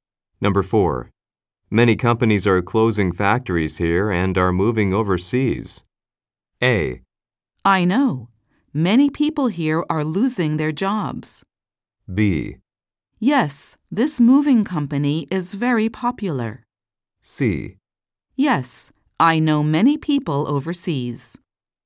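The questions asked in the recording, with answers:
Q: Many companies are closing factories here and are moving overseas.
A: A: I know. Many people here are losing their jobs.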